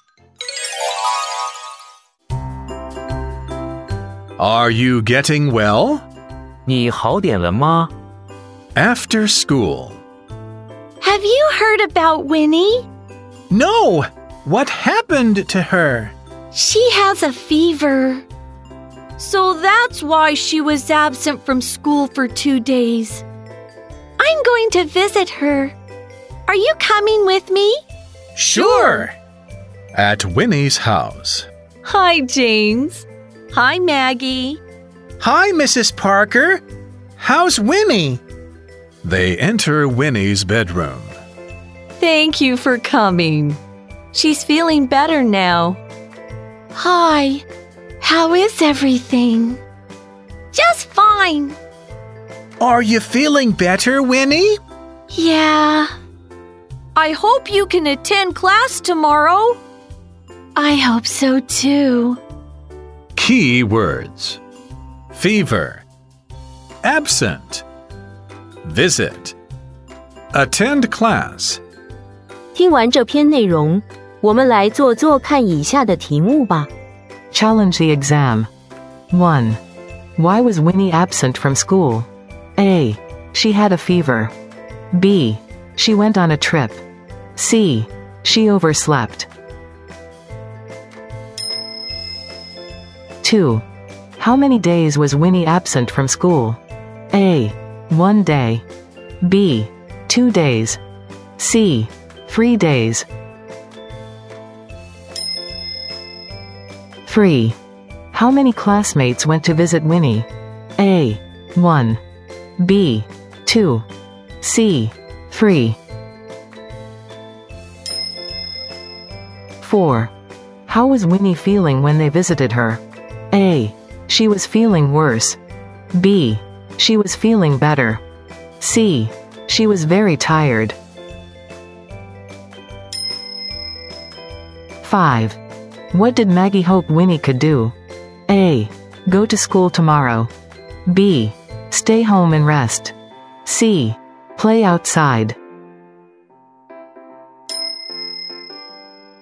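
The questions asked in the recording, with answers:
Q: Why was Winnie absent from school?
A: A: She had a fever.

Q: How many days was Winnie absent from school?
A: B: 2 days.

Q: How many classmates went to visit Winnie?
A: B: 2.

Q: How was Winnie feeling when they visited her?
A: B: She was feeling better.

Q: What did Maggie hope Winnie could do?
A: A: Go to school tomorrow.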